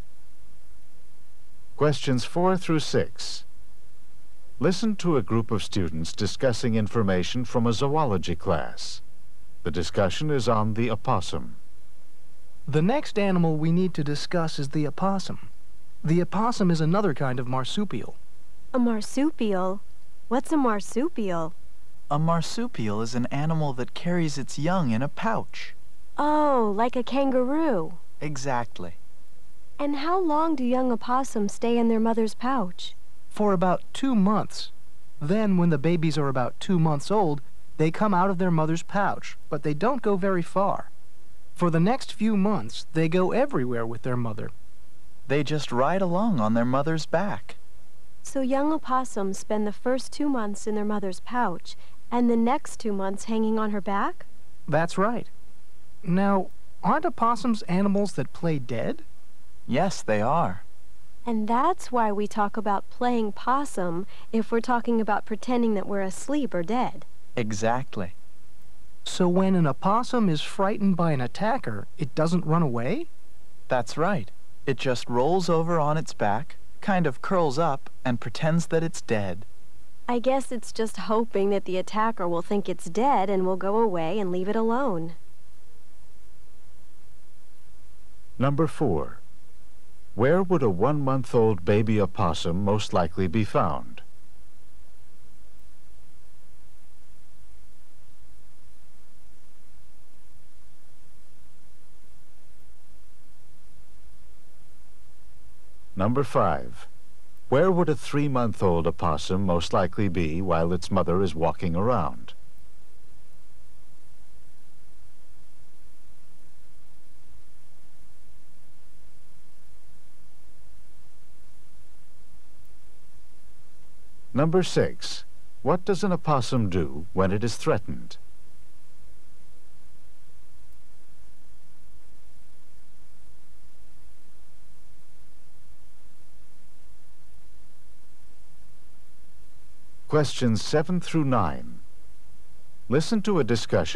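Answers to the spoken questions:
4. In its mother's pouch
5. On its mother's back
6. It rolls over and plays dead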